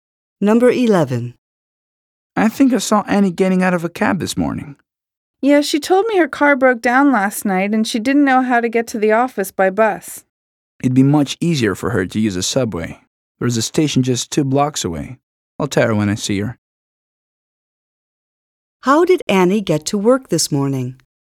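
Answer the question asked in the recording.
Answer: By taxi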